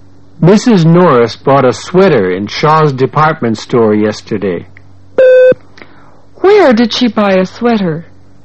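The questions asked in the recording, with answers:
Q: Where did she buy a sweater?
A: In Shaw's department store.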